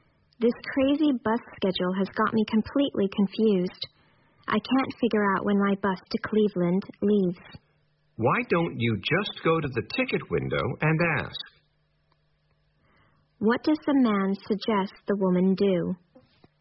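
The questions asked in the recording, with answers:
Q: What does the man suggest the woman do?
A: Ask at the ticket window about her bus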